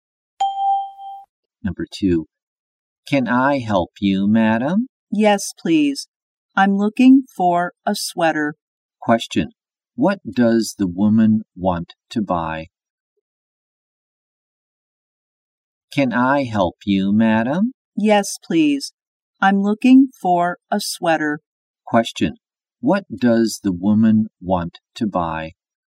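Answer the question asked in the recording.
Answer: A sweater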